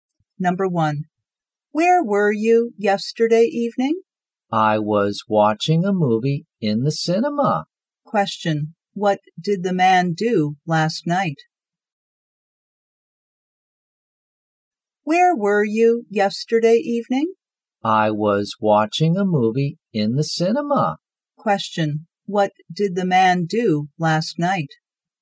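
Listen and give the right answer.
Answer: He watched a movie in the cinema.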